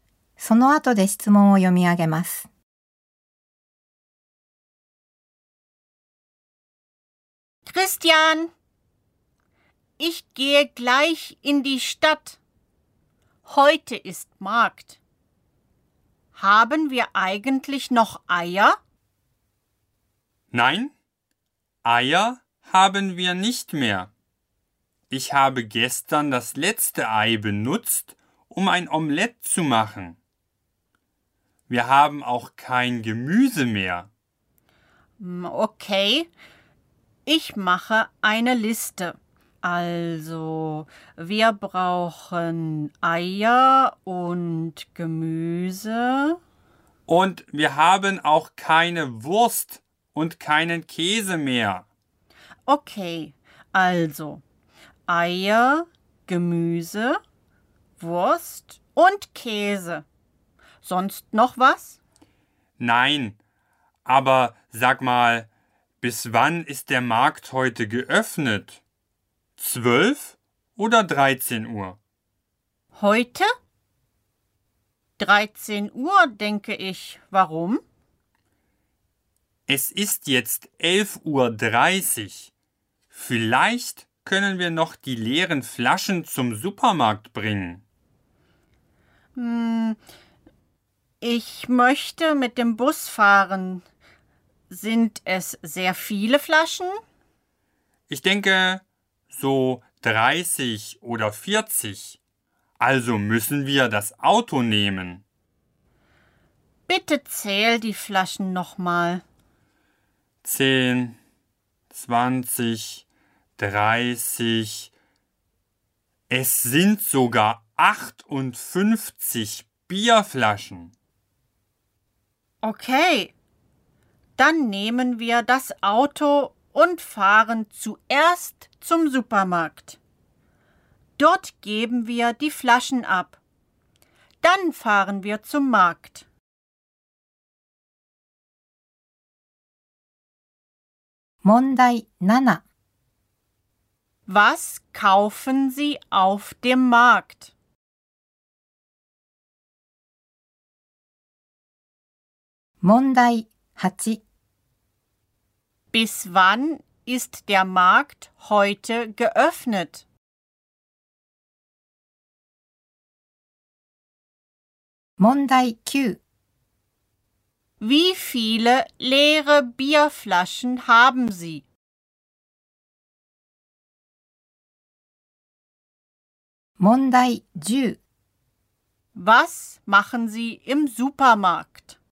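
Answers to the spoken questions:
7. Eier, Gemüse, Wurst und Käse
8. Bis 13 Uhr
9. 58
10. Wir geben die leeren Flaschen ab.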